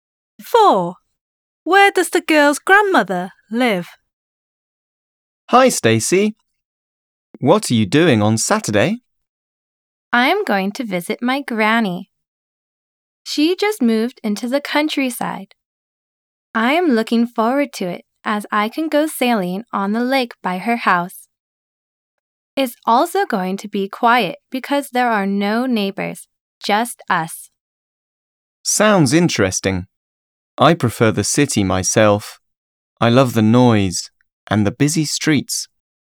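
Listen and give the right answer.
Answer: In the countryside, by a lake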